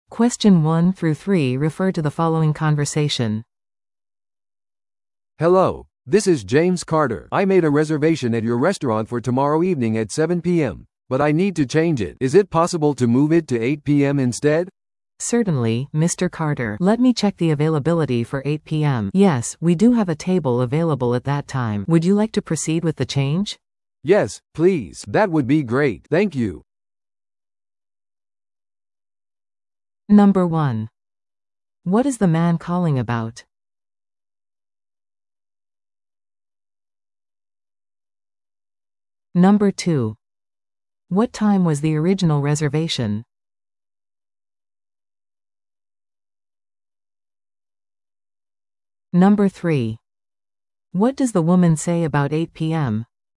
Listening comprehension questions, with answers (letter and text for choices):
Listen to the audio below and answer the questions.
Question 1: What is the man calling about?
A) 夕食の予約をすること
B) 予約をキャンセルすること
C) 予約を変更すること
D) レストランのメニューについて尋ねること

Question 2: What time was the original reservation?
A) 午後6時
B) 午後7時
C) 午後8時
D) 午後9時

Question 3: What does the woman say about 8 PM?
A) 空いている席がない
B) その時間はレストランが閉まっている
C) 席が空いている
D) 混雑する時間帯である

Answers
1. C) 予約を変更すること
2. B) 午後7時
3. C) 席が空いている

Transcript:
A: "Hello, this is James Carter. I made a reservation at your restaurant for tomorrow evening at 7 PM, but I need to change it. Is it possible to move it to 8 PM instead?"
B: "Certainly, Mr. Carter. Let me check the availability for 8 PM... Yes, we do have a table available at that time. Would you like to proceed with the change?"
A: "Yes, please. That would be great. Thank you!"